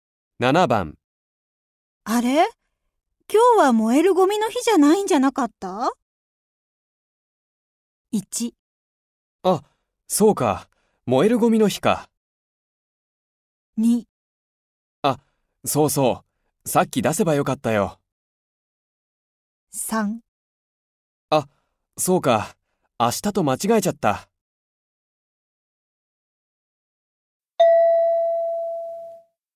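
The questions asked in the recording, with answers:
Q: あれ?今日は燃えるゴミの日じゃないんじゃなかった?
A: 3: あ、そうか。明日と間違えちゃった。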